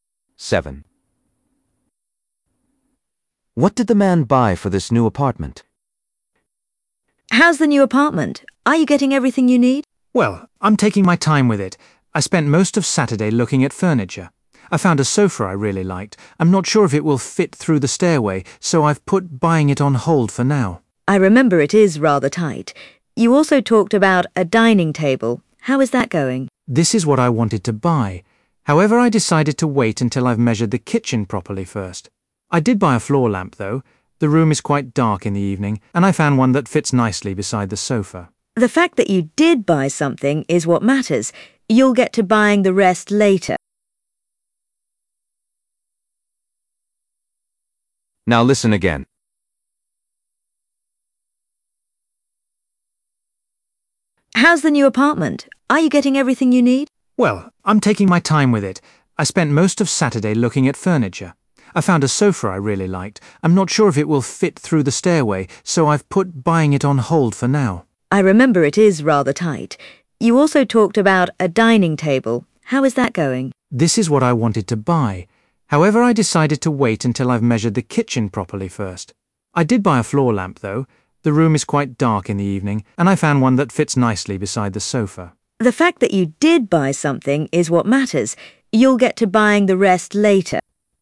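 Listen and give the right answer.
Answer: a floor lamp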